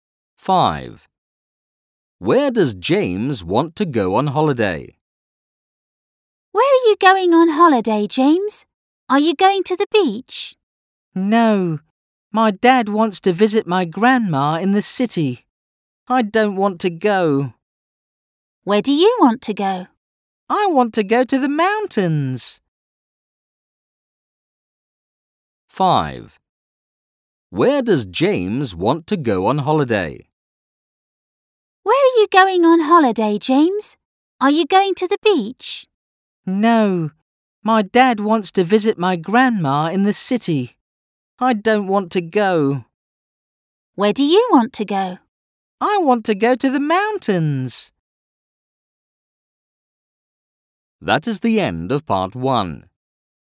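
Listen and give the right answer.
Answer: To the mountains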